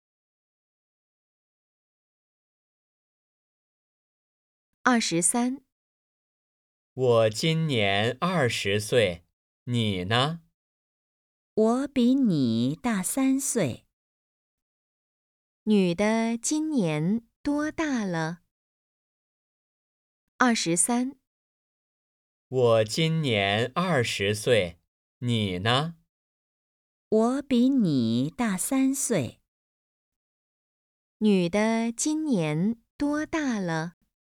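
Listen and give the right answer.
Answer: 二十三岁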